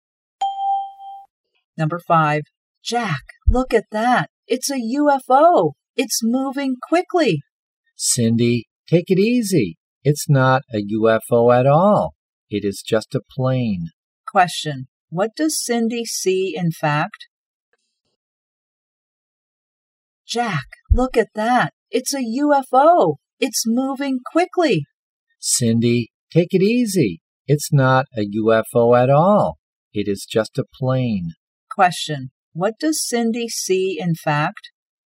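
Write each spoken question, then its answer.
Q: what does Cindy see in fact?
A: A plane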